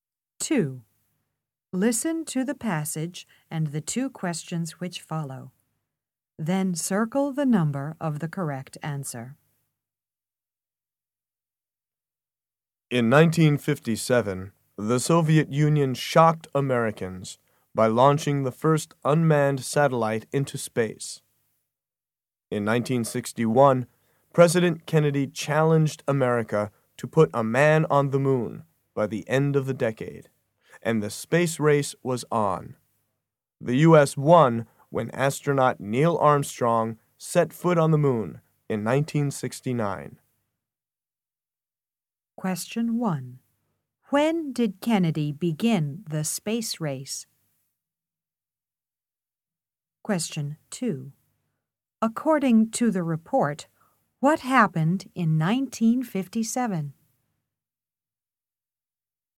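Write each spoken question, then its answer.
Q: When did Kennedy begin the space race?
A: In 1961

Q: According to the report, what happened in 1957?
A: The Soviet Union launched the first unmanned satellite into space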